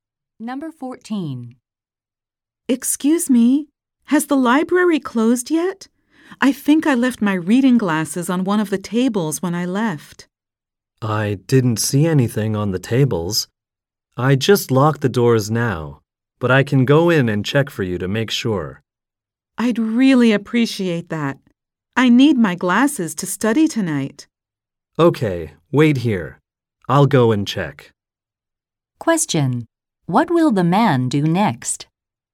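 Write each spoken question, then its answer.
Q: What will the man do next?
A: Go into the library to look for her glasses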